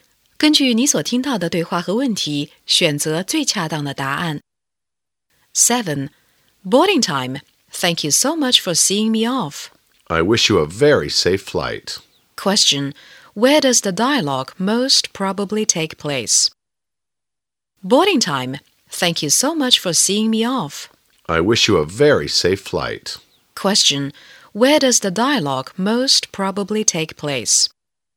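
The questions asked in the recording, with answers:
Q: Question. Where does the dialogue most probably take place?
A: At an airport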